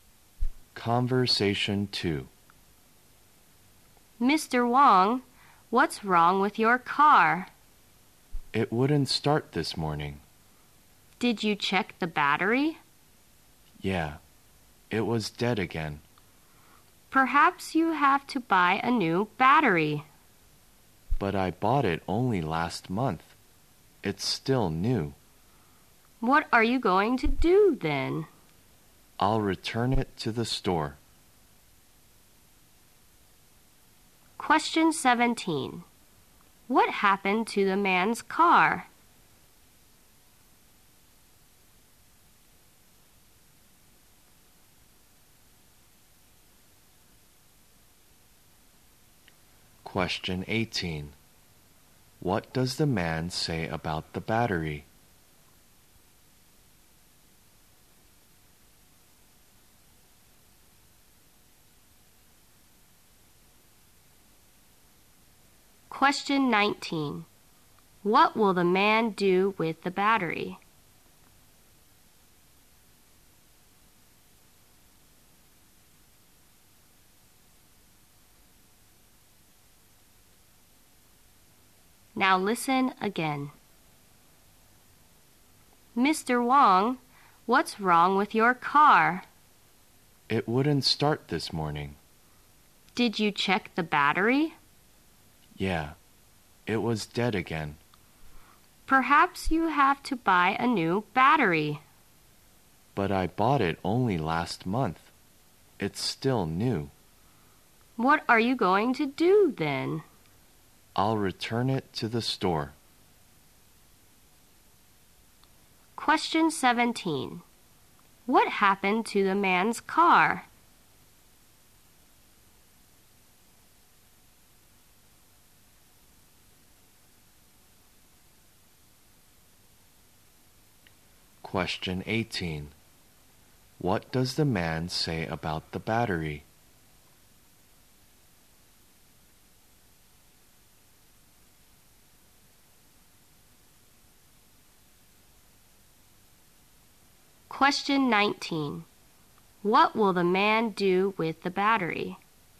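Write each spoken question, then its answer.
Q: What happened to the man's car?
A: It wouldn't start this morning

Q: What does the man say about the battery?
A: It's still new; he bought it only last month

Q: What will the man do with the battery?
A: Return it to the store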